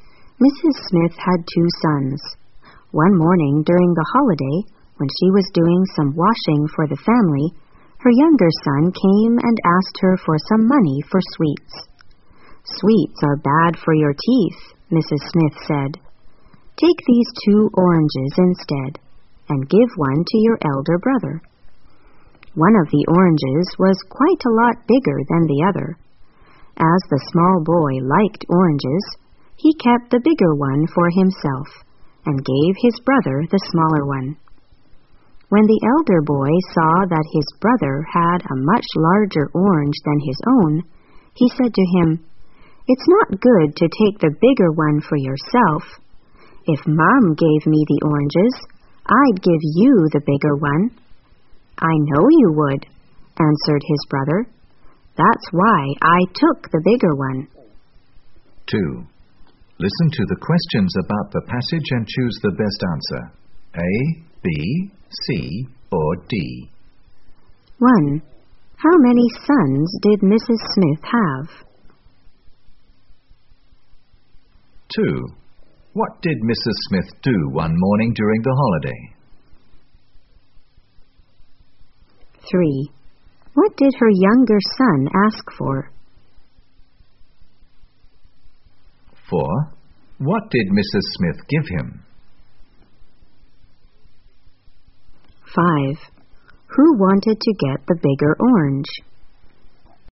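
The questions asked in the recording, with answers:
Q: How many sons did Mrs. Smith have?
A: Two

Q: What did Mrs. Smith do one morning during the holiday?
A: She was doing some washing for the family

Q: What did her younger son ask for?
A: Some money for sweets

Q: What did Mrs. Smith give him?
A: Two oranges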